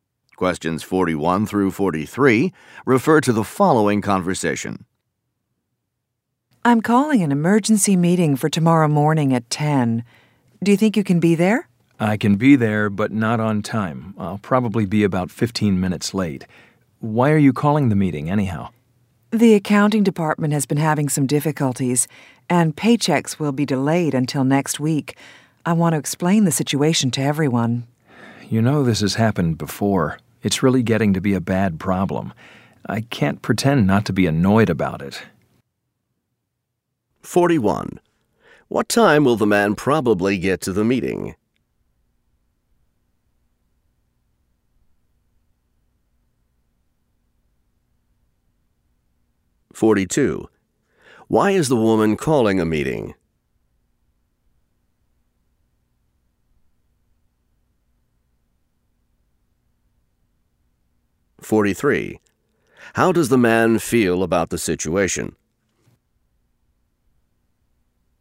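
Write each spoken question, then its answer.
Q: What time will the man probably get to the meeting?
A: About 10:15

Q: Why is the woman calling a meeting?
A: To explain that paychecks will be delayed

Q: How does the man feel about the situation?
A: Annoyed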